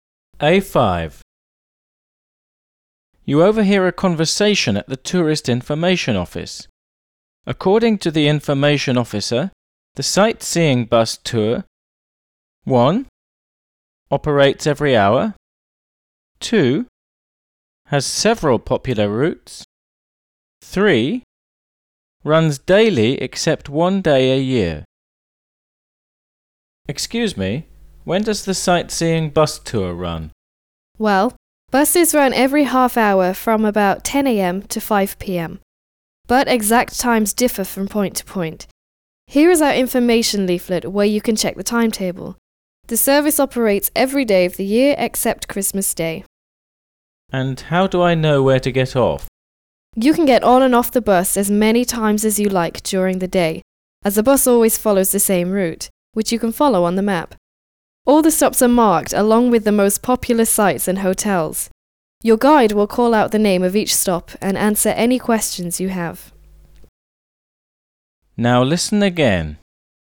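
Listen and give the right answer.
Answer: 3: Runs daily except one day a year.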